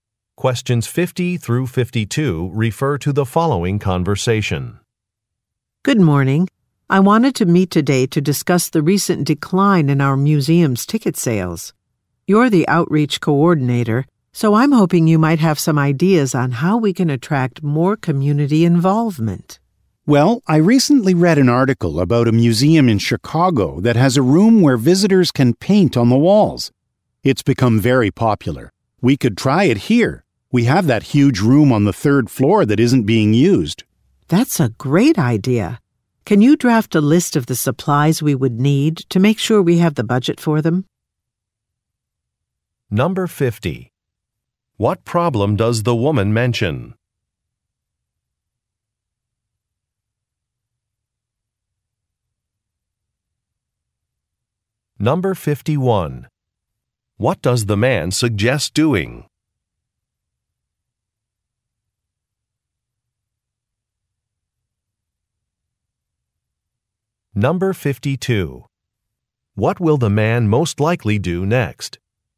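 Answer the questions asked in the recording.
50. A decline in the museum's ticket sales
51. Creating a room where visitors can paint on the walls
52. Draft a list of needed supplies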